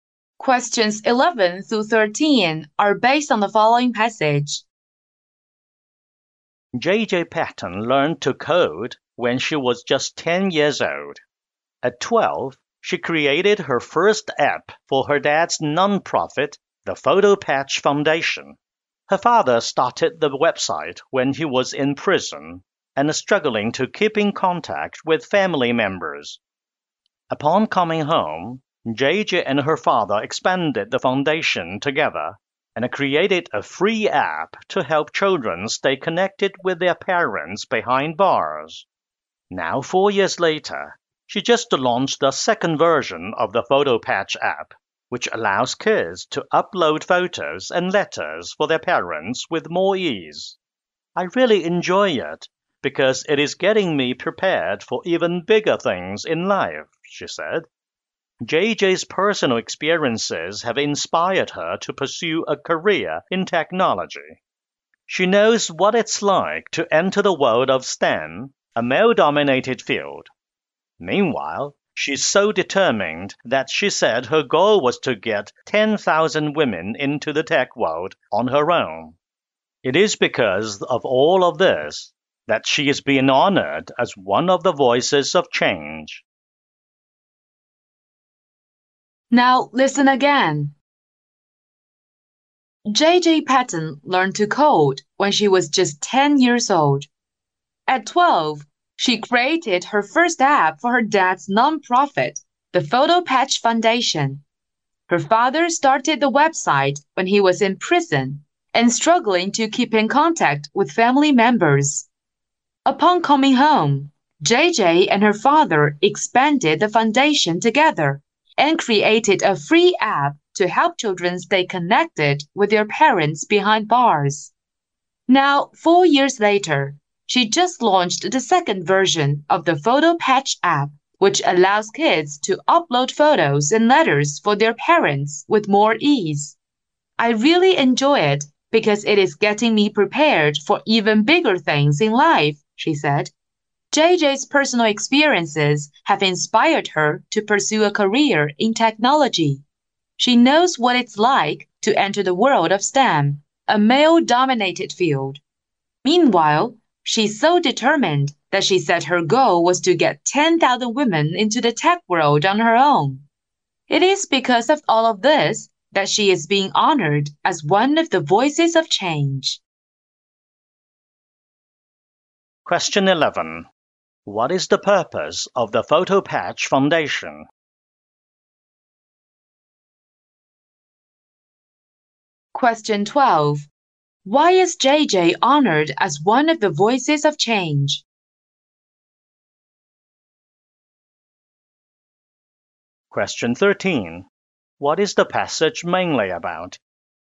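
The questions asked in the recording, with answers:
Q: What is the purpose of the Photo Patch Foundation?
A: To help children stay connected with parents in prison

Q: Why is JJ honored as one of the voices of change?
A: Her app work and determination to bring women into tech

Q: What is the passage mainly about?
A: JJ Patton, a young coder who built an app for her father's foundation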